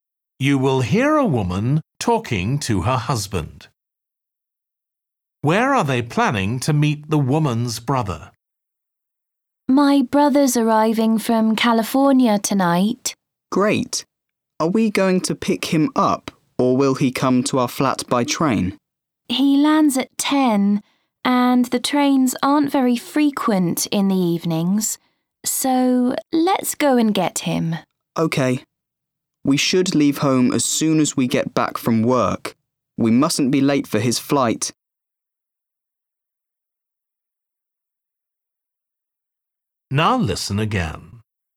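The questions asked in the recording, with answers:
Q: Where are they planning to meet the woman's brother?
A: At the airport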